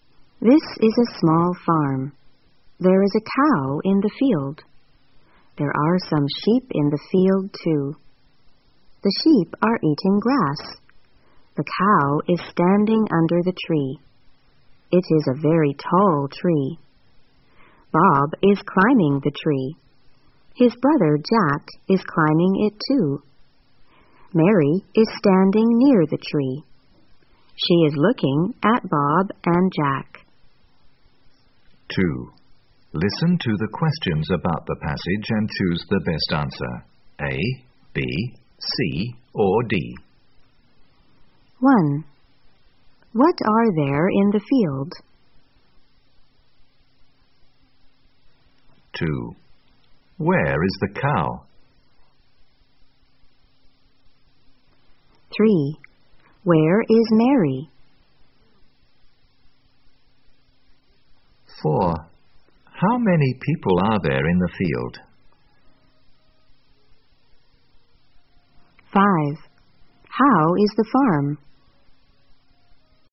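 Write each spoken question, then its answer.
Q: What are there in the field?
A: A cow and some sheep

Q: Where is the cow?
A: Under the tree

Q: Where is Mary?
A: Near the tree

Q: How many people are there in the field?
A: Three

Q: How is the farm?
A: It is small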